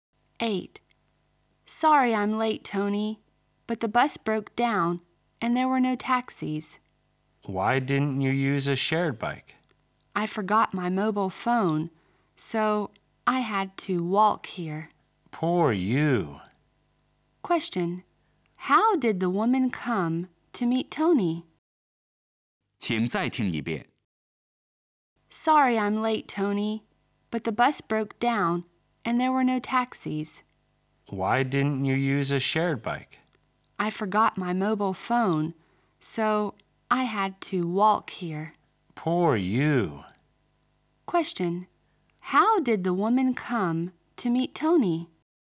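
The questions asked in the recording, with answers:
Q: How did the woman come to meet Tony?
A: On foot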